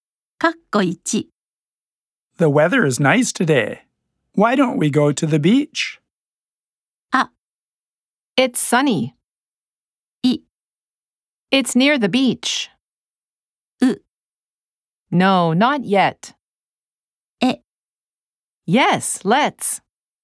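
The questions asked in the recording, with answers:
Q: Why don't we go to the beach?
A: え: Yes, let's.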